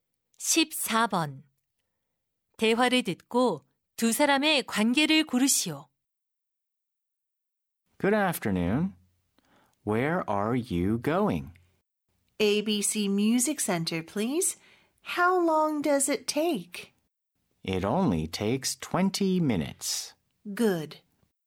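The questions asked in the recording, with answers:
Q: 대화를 듣고 두 사람의 관계를 고르시오.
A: 택시 기사와 승객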